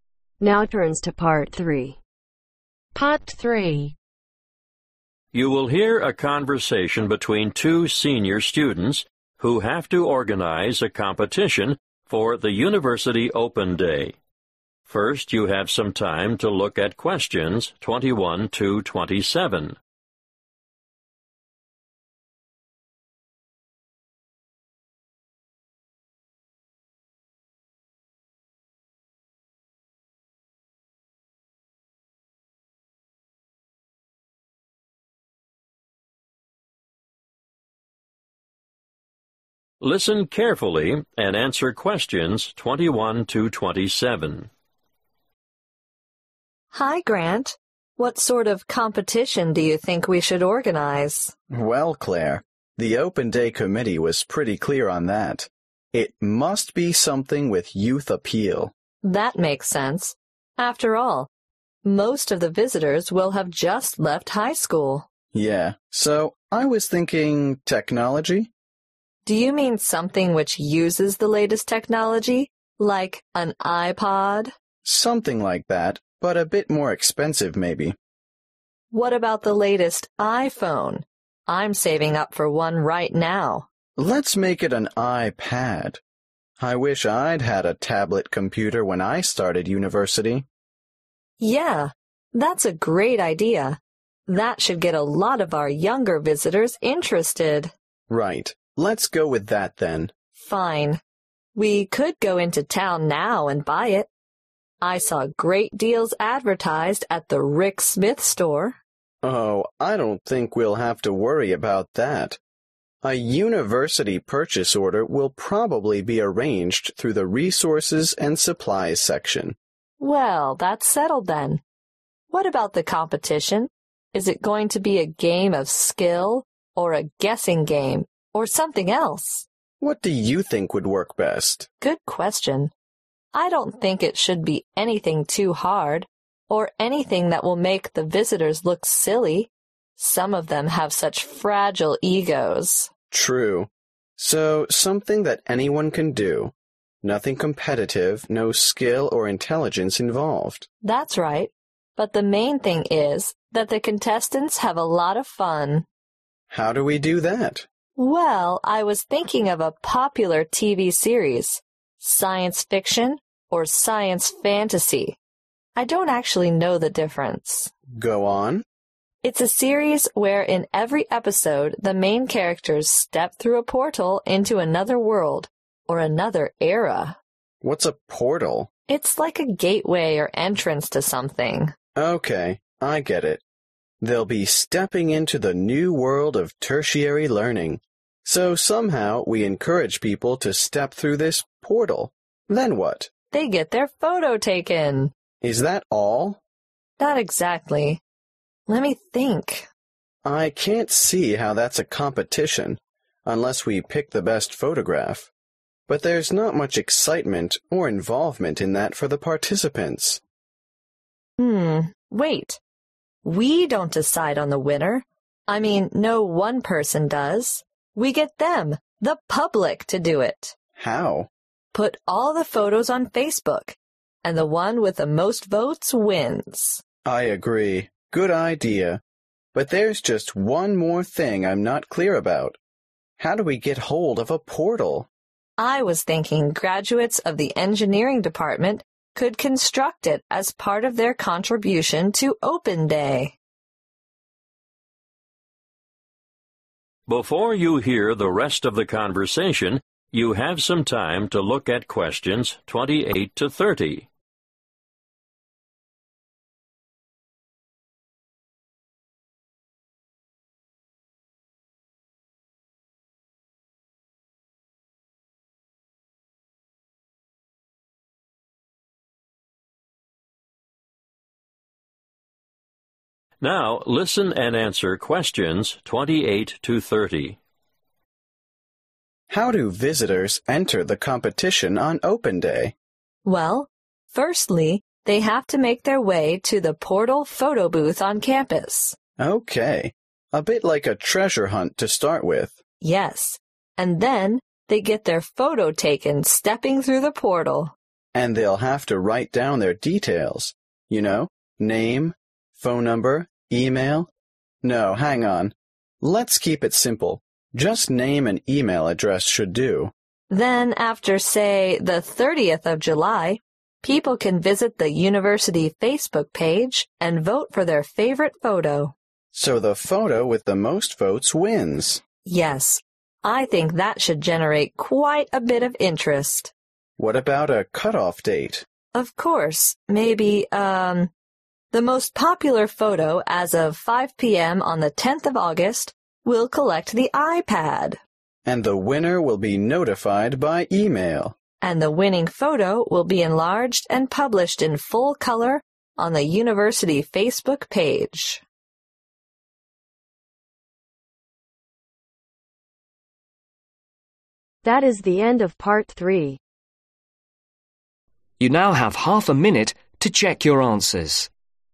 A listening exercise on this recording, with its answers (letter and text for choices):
Choose the correct letter A , B or C.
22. What will the prize be ?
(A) an iPod.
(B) an iPad.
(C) an iPhone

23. Who will be responsible for buying the prize ?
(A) a university department.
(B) Clare and Grant.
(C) Rick Smith.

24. What is the important aspect for entrants in the competition ?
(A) fun.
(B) guesswork.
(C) ability.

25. In the science fiction series on television, what is on the other side of the gateway ?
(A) a portal.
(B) a new world of education.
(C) a different time period.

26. Who will judge the competition ?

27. who will build the portal ?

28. Step 1 Find 'Portal (28)............' on campus on Open Day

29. Step 3 Give contact (29)............ (name & email address)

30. Step 5 The picture with the most votes at 5 pm on (30)............ wins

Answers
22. (B) an iPad.
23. (A) a university department.
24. (A) fun.
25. (C) a different time period.
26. The public
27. Engineering Department graduates/graduates of engineering
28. Photo booth
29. Details
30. 10/10th August